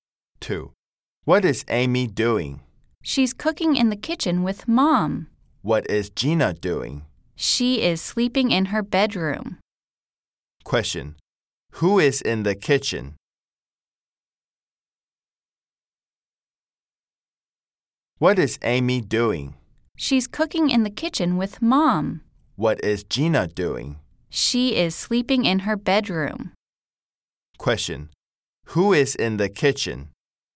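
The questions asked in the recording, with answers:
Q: Question. Who is in the kitchen?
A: Amy and Mom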